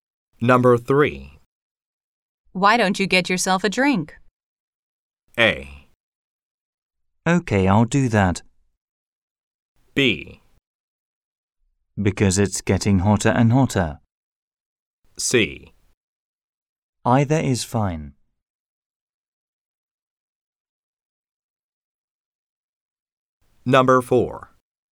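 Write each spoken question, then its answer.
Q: Why don't you get yourself a drink?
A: A: Okay, I'll do that.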